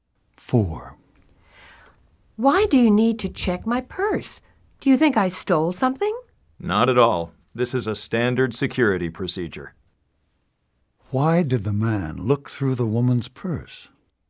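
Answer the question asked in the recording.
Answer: It is a standard security procedure.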